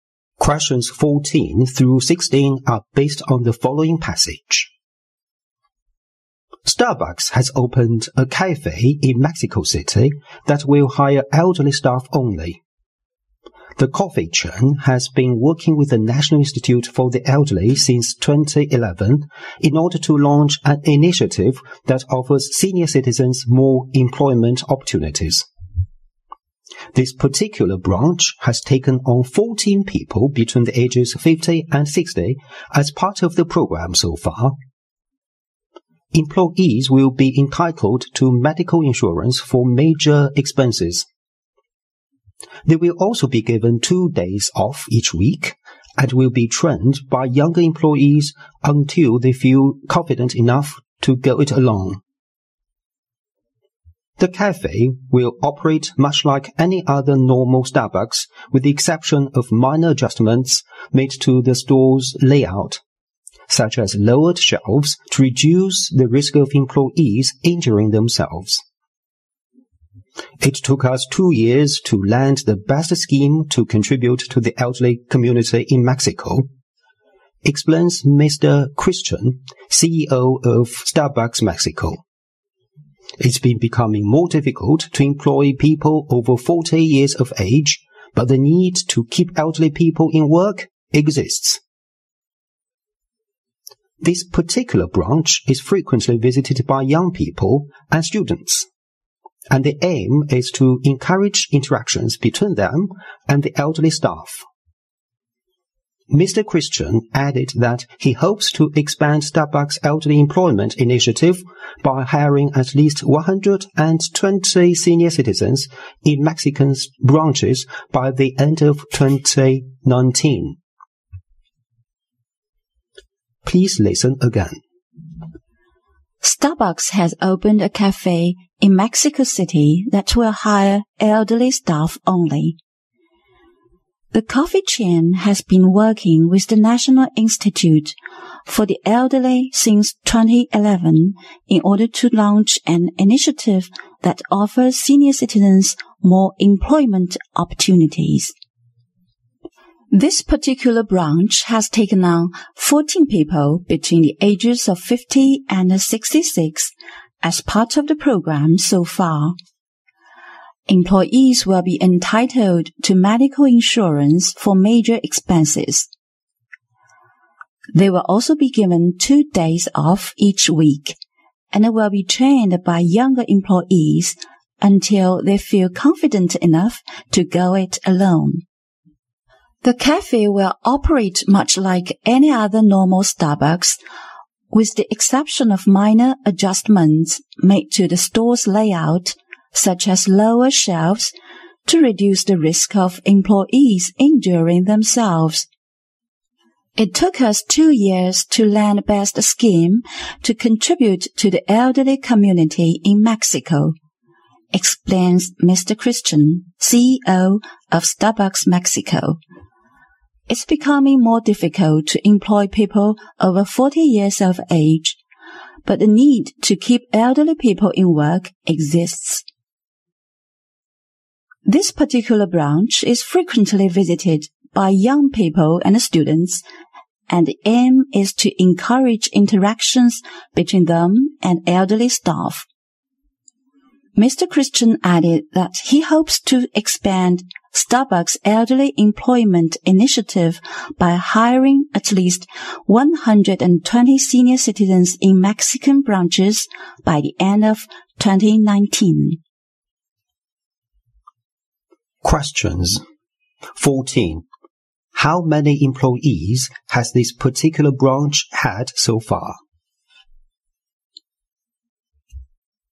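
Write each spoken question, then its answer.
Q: How many employees has this particular branch had so far?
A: 14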